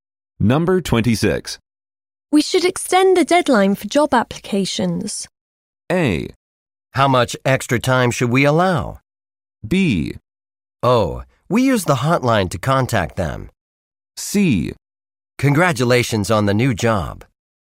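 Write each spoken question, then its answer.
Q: We should extend the deadline for job applications.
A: A: How much extra time should we allow?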